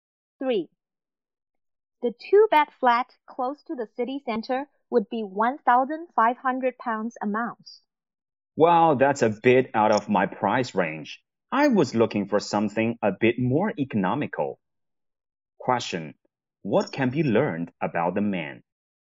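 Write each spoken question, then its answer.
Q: What can be learned about the man?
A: He wants a cheaper flat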